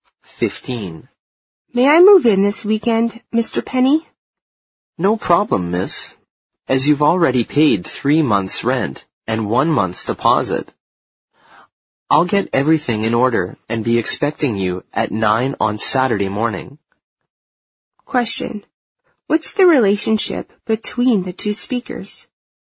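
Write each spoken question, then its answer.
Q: What's the relationship between the two speakers?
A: Landlord and tenant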